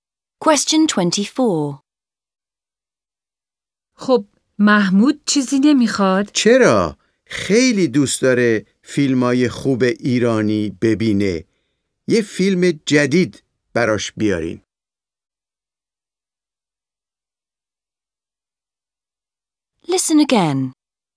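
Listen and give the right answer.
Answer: یک فیلم جدید ایرانی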